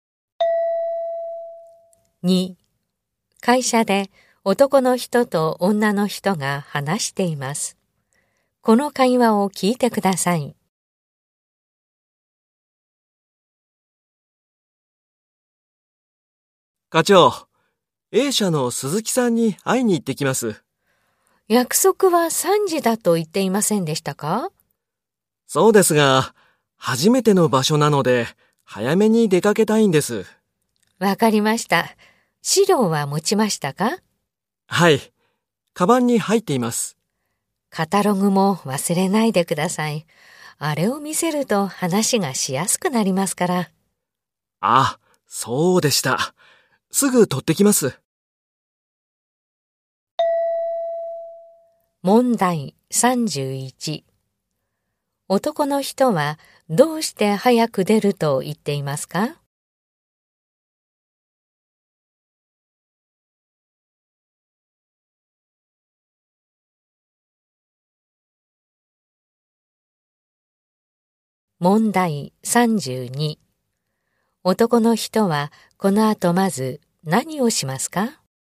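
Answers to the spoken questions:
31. 初めての場所だから
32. カタログを取ってくる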